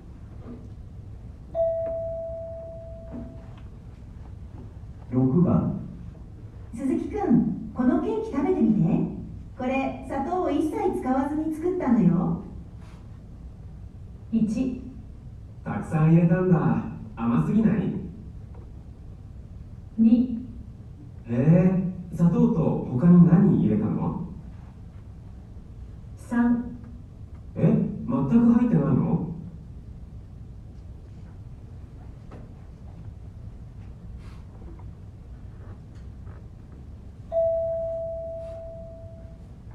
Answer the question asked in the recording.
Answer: 3

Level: N1 Listening · Test 2